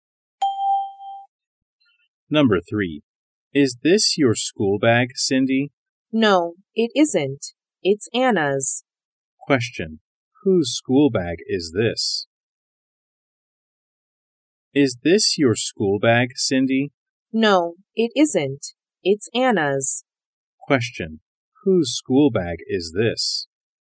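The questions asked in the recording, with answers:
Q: Whose school bag is this?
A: Anna's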